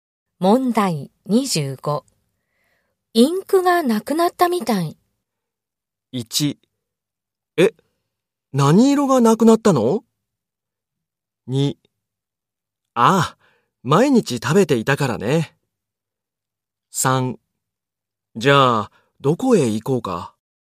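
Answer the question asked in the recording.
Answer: 1: え、何色がなくなったの?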